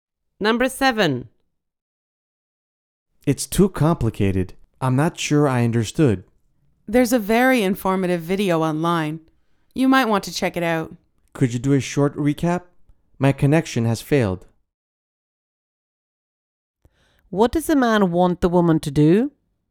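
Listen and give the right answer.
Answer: Give him a short recap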